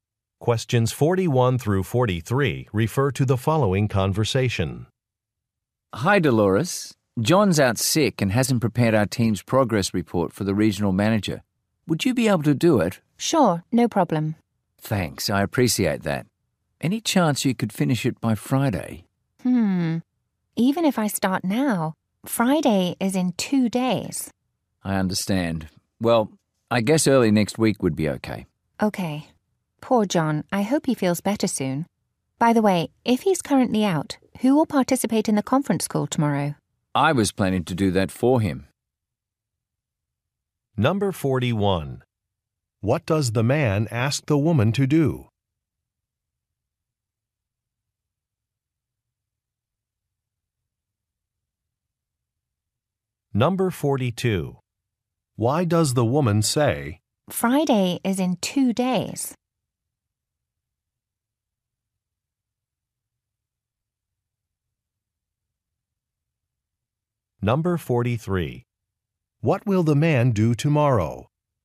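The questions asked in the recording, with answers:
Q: What does the man ask the woman to do?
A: Prepare the team's progress report

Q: Why does the woman say,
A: The deadline is too soon to finish the report

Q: What will the man do tomorrow?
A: Take part in the conference call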